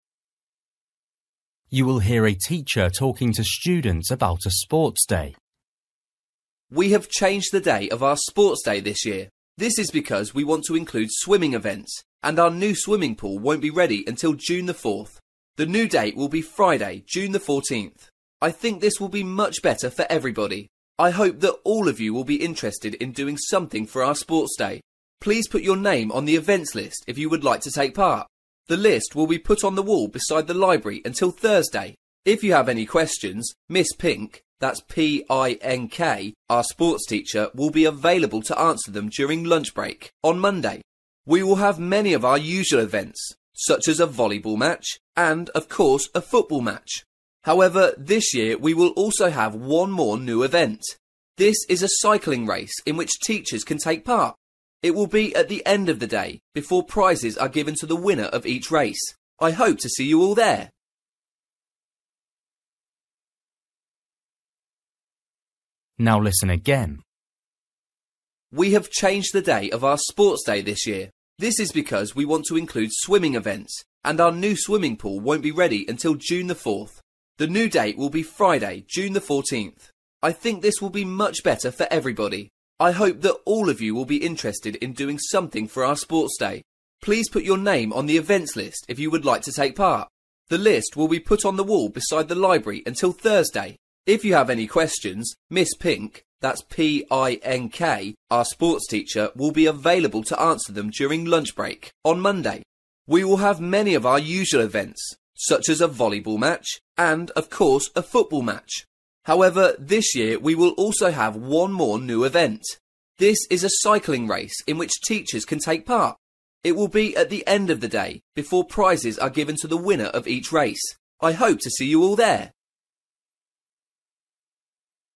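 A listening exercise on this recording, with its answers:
For each question, write the correct answer in the gap. Write one word or a number or a date or a time.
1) Date of sports day: (1)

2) Events list next to: (2)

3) List open until: (3)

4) For more info ask: (4) Miss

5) Sport race for teachers: (5)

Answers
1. 14th June
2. library
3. Thursday
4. Pink
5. cycling

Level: Luyện nghe trình độ A2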